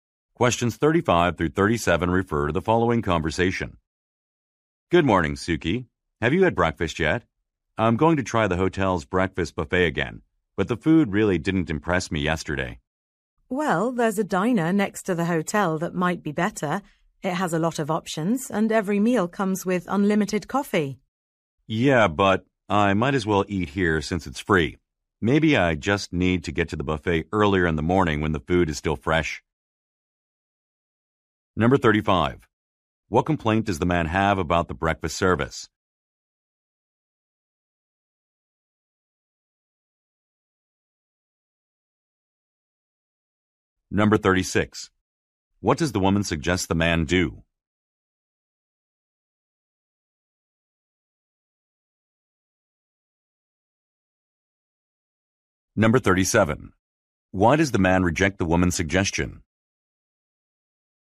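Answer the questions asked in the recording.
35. The food was not impressive
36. Eat at the diner next to the hotel
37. The hotel breakfast is free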